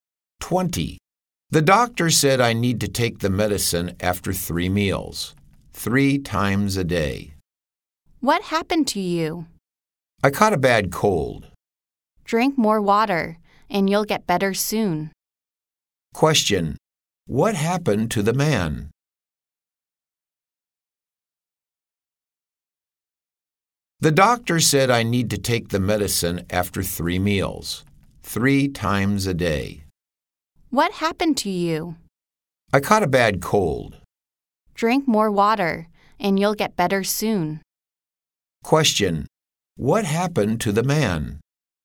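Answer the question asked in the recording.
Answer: He caught a bad cold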